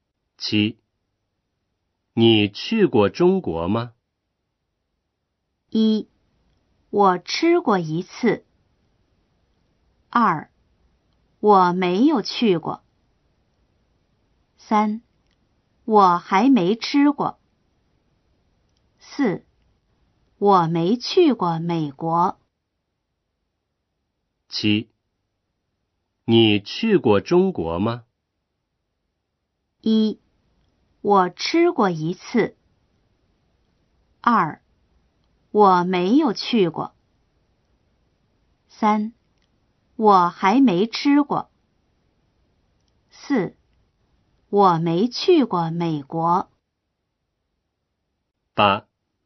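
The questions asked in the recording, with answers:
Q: 你去过中国吗?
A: 2: 我没有去过。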